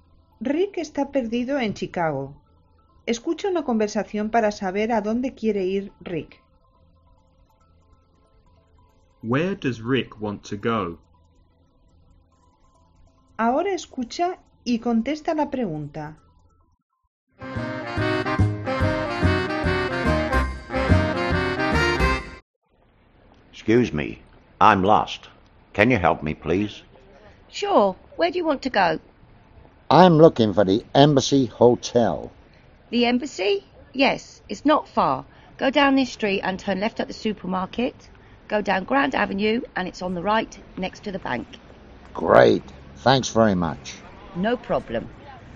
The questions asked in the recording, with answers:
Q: Where does Rick want to go?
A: To the Embassy Hotel.